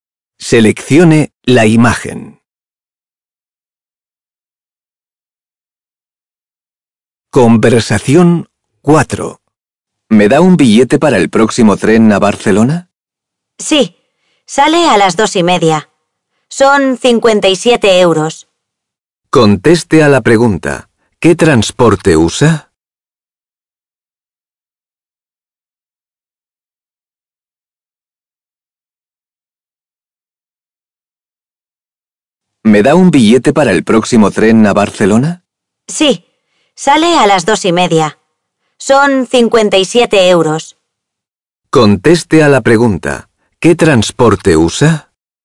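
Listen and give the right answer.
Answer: El tren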